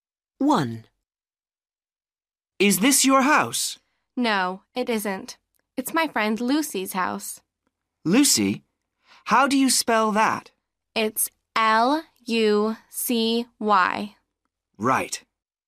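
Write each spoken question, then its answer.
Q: Lucy? How do you spell that?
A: L-U-C-Y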